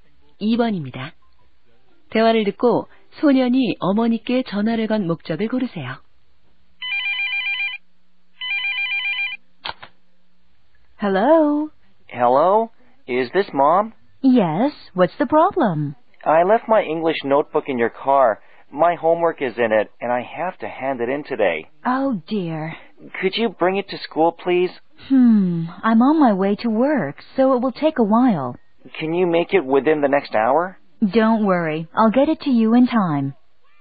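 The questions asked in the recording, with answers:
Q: 대화를 듣고 소년이 어머니께 전화를 건 목적을 고르세요.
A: 차에 두고 온 영어 공책을 학교에 가져다 달라고 부탁하려고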